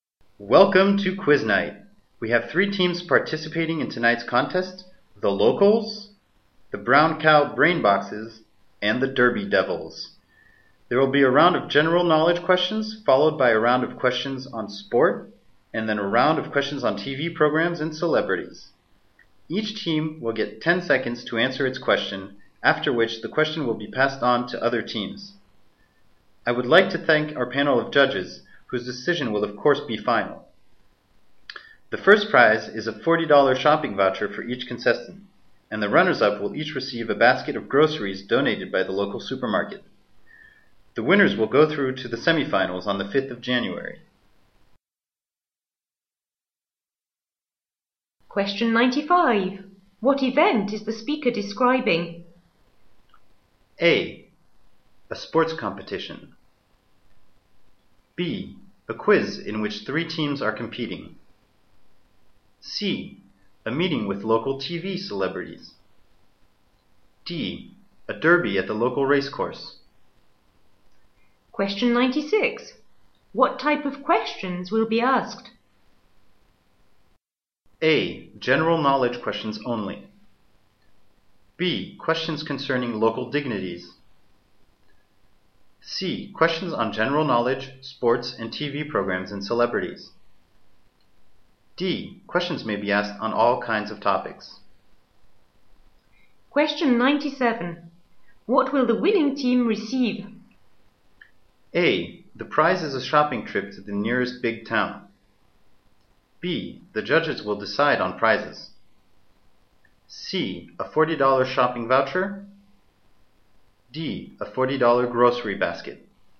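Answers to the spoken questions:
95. B: A quiz in which three teams are competing.
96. C: Questions on general knowledge, sports, and TV programs and celebrities.
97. C: A $40 shopping voucher.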